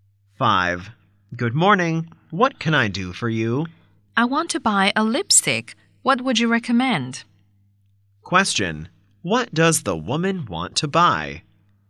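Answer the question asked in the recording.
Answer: A lipstick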